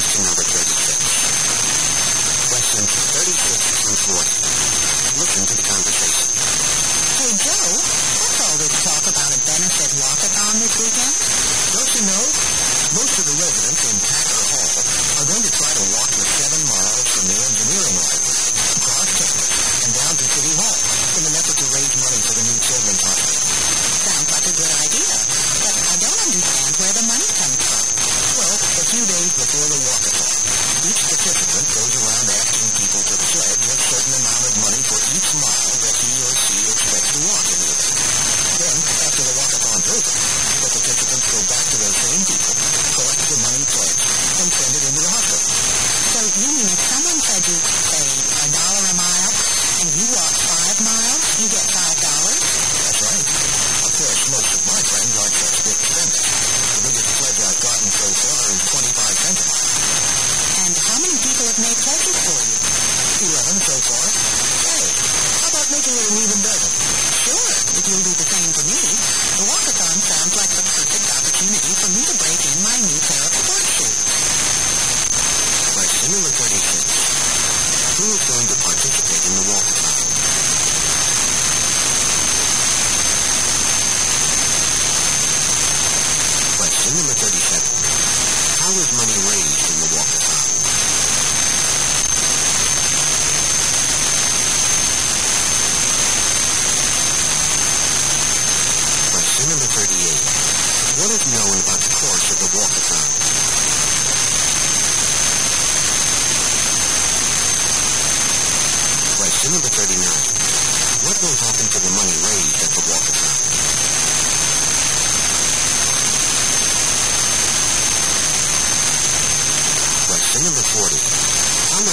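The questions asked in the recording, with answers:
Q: What will happen to the money raised at the Walker Fountain?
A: It will go to the new children's hospital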